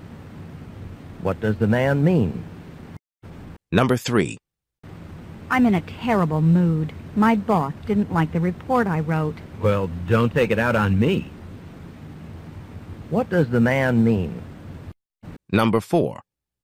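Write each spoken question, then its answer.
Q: What does the man mean?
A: She shouldn't be angry with him, because he didn't cause her problem.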